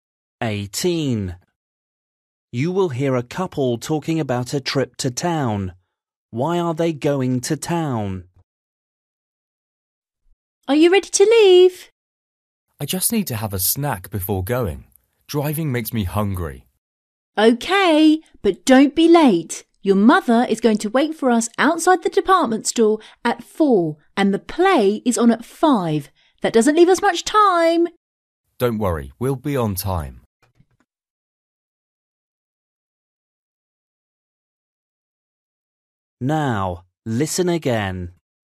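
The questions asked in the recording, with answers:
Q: Why are they going to town?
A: To see a play, meeting his mother first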